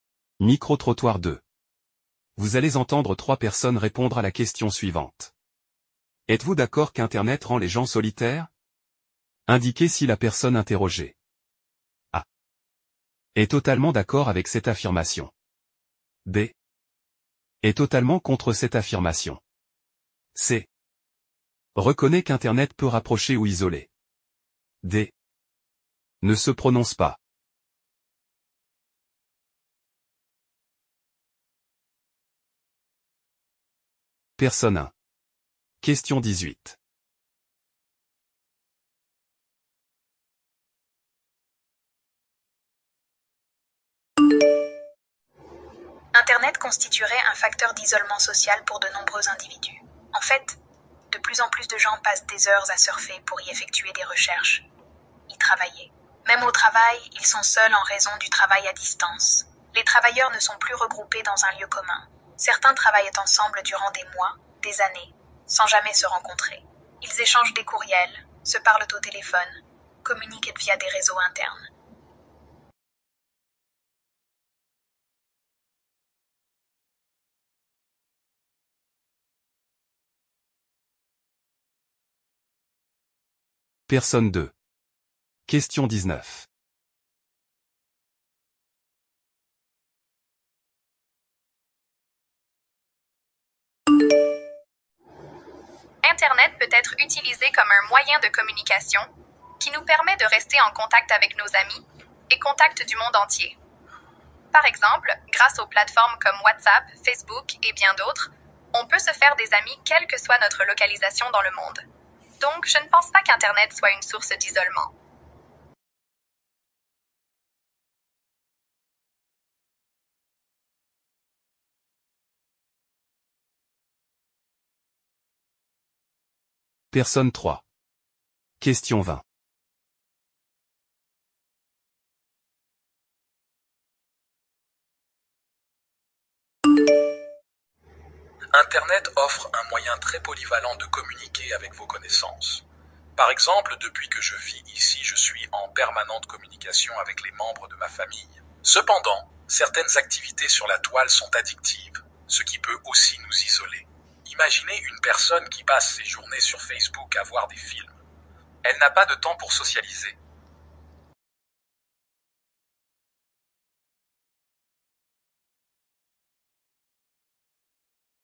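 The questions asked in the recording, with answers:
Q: Êtes-vous d'accord qu'Internet rend les gens solitaires?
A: A: est totalement d'accord avec cette affirmation

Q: Êtes-vous d'accord qu'Internet rend les gens solitaires?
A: B: est totalement contre cette affirmation

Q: Êtes-vous d'accord qu'Internet rend les gens solitaires?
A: C: reconnaît qu'Internet peut rapprocher ou isoler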